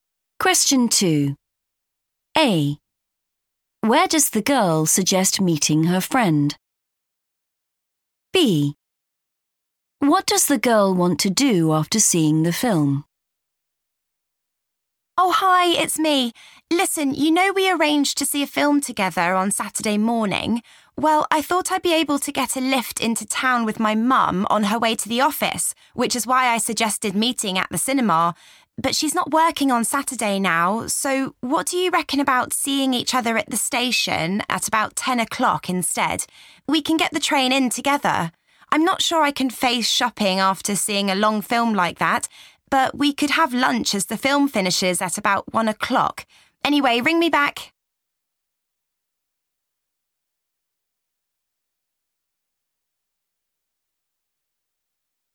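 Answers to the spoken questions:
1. at the station
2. have lunch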